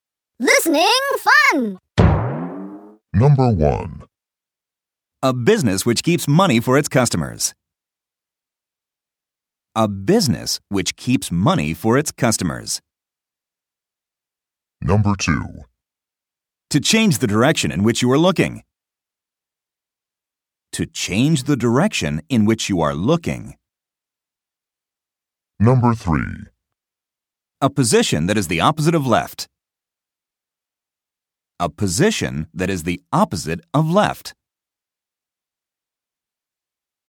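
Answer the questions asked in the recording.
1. bank
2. turn
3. right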